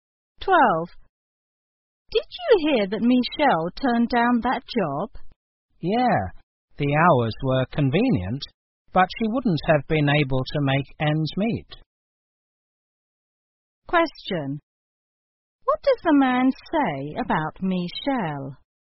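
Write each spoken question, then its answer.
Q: What does the man say about Michelle?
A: The job would not have paid her enough to live on.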